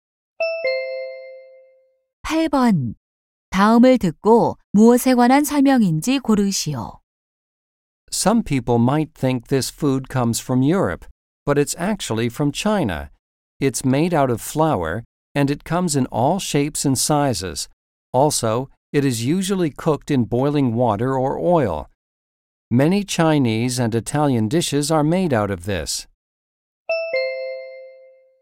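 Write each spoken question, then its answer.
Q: 다음을 듣고 무엇에 관한 설명인지 고르시오.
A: 국수(면)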